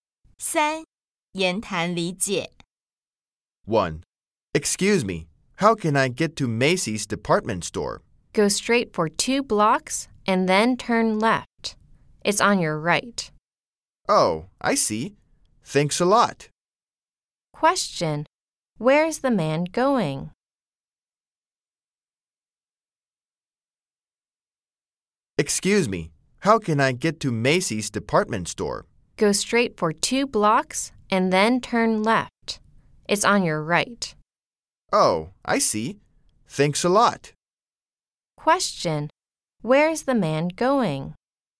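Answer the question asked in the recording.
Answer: Macy's department store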